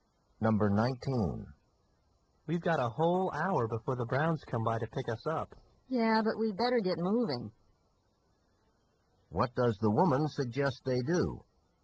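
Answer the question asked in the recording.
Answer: Start getting ready now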